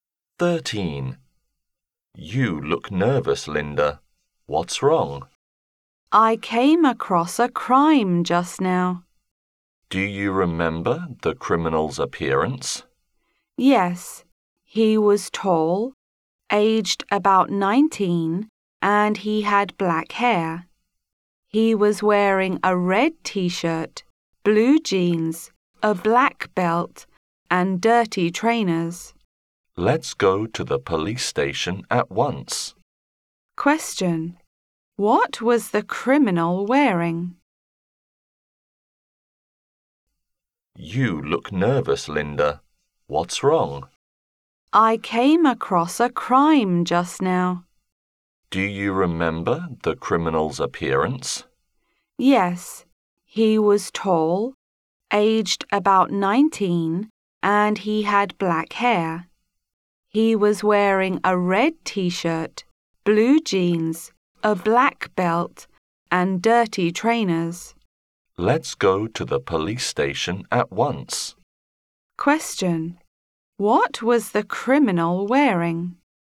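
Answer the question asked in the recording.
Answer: A red T-shirt, blue jeans, a black belt and dirty trainers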